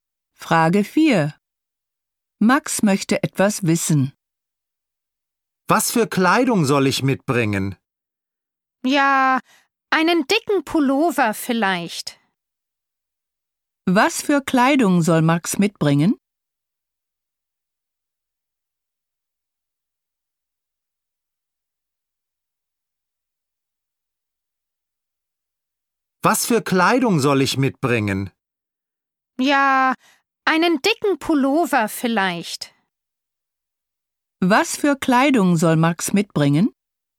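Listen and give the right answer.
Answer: Einen dicken Pullover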